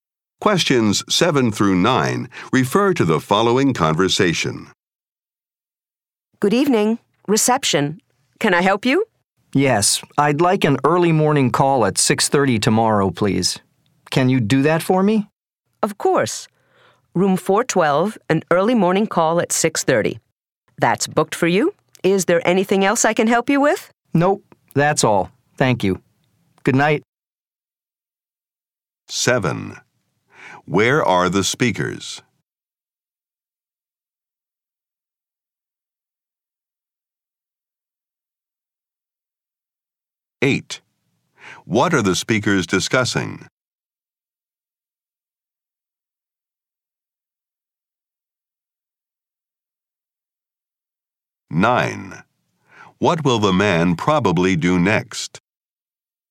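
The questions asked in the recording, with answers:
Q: Where are the speakers?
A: At a hotel

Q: What are the speakers discussing?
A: An early morning wake-up call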